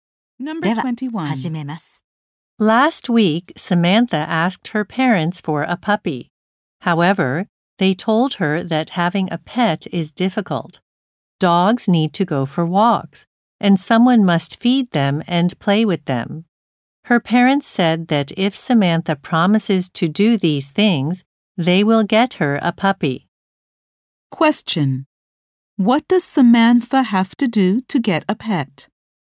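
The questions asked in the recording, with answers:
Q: What does Samantha have to do to get a pet?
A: Promise to walk, feed and play with it.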